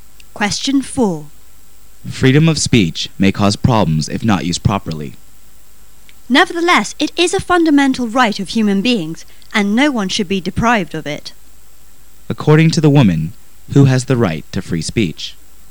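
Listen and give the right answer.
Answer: Everyone; all human beings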